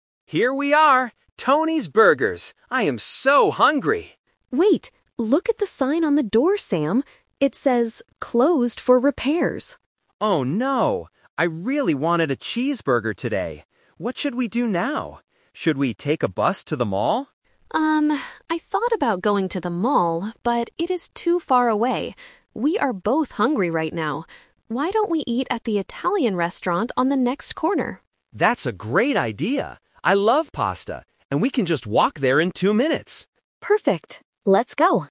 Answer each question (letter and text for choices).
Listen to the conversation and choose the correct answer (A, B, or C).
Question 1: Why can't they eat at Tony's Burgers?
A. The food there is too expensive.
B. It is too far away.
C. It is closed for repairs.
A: C. It is closed for repairs.

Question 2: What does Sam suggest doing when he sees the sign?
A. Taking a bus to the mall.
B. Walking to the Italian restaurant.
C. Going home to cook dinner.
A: A. Taking a bus to the mall.

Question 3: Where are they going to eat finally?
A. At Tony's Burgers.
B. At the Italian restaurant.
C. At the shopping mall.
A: B. At the Italian restaurant.

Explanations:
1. Julie says, "Wait, look at the sign on the door, Sam. It says 'Closed for repairs'." Option A is a plausible reason but is not mentioned. Option B is the Trap (being "too far away" is the reason they don't go to the mall, not the reason they can't eat burgers).
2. When Sam sees the closed sign, he asks, "Should we take a bus to the mall?" Option B is the Trap (Julie is the one who suggests the Italian restaurant, not Sam). Option C is not mentioned.
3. This is the Final Result (The Twist). Julie suggests eating at the Italian restaurant because it is close, and Sam agrees. Option A is the Trap (the original plan that failed). Option C is also a Trap (Sam's suggestion that was rejected).

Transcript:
Sam: Here we are! Tony's Burgers. I am so hungry.
Julie: Wait, look at the sign on the door, Sam. It says "Closed for repairs."
Sam: Oh no! I really wanted a cheeseburger today. What should we do now? Should we take a bus to the mall?
Julie: Um, I thought about going to the mall, but it is too far away. We are both hungry right now. Why don't we eat at the Italian restaurant on the next corner?
Sam: That's a great idea! I love pasta, and we can just walk there in two minutes.